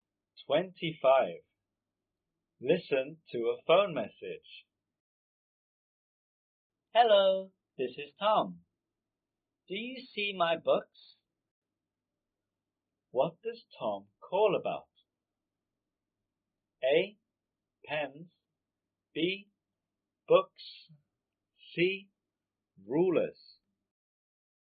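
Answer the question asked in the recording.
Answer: B: Books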